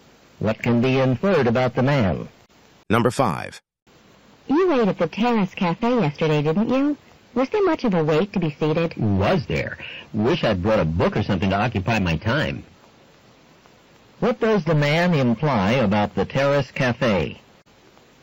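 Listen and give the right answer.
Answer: There was a long wait to be seated.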